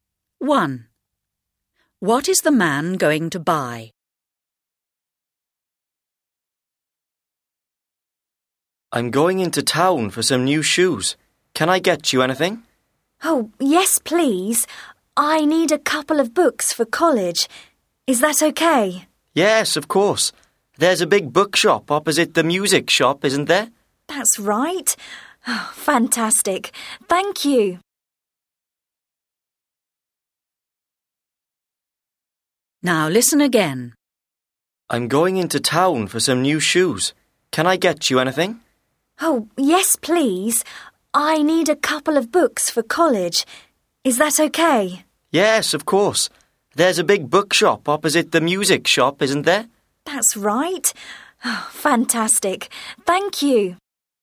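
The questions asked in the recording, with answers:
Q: What is the man going to buy?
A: Books for college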